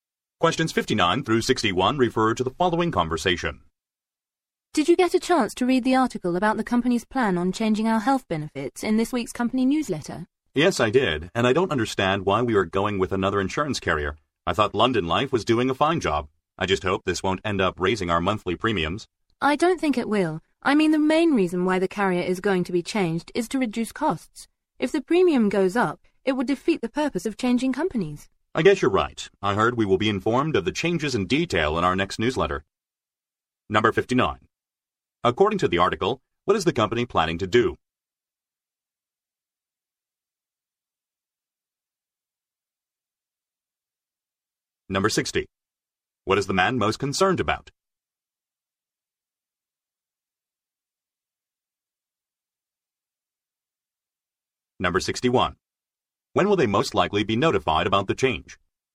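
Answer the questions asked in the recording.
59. Change its health insurance carrier
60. Higher monthly premiums
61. In the next newsletter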